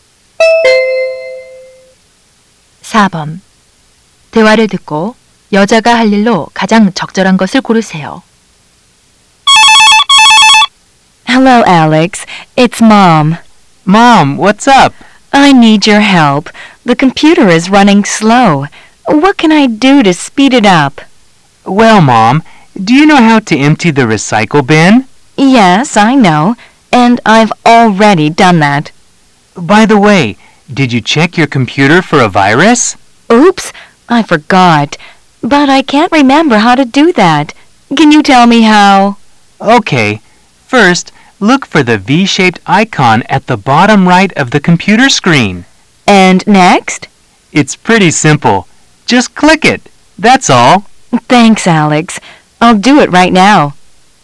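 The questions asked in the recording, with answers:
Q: 대화를 듣고 여자가 할 일로 가장 적절한 것을 고르세요.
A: 컴퓨터 바이러스 검사하기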